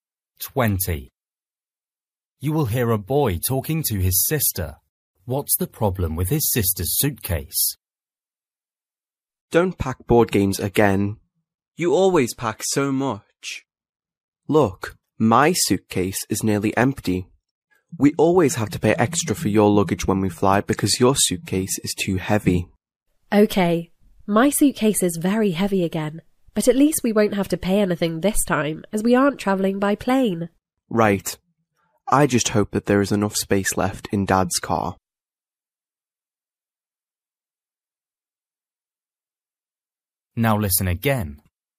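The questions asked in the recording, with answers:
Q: What's the problem with his sister's suitcase?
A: It is too heavy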